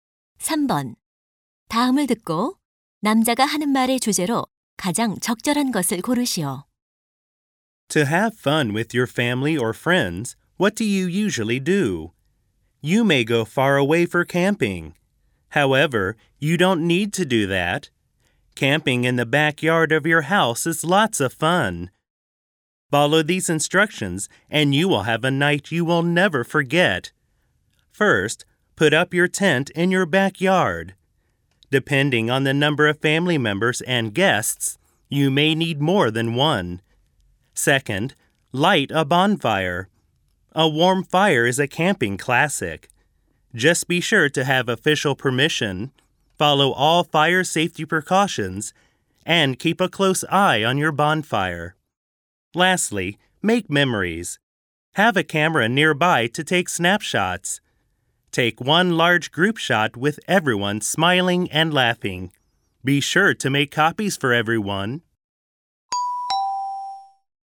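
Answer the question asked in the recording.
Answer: 집 뒷마당에서 캠핑을 즐기는 방법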